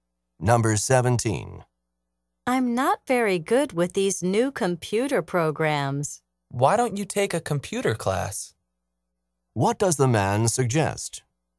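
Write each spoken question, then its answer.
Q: What does the man suggest?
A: Taking a computer class.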